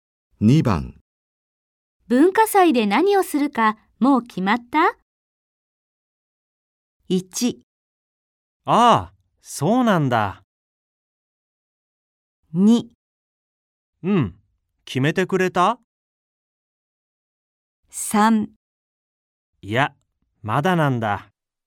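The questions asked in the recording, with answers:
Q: 文化祭で何をするか、もう決まった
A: 3: いや、まだなんだ。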